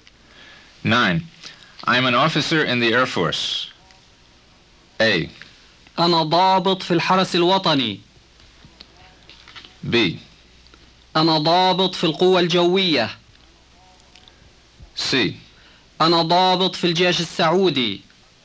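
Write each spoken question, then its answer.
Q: I'm an officer in the Air Force.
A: B: أنا ضابط في القوة الجوية.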